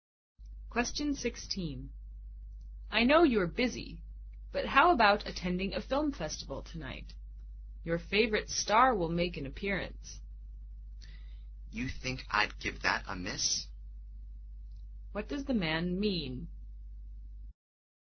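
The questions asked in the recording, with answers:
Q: What does the man mean?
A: He will certainly go to the film festival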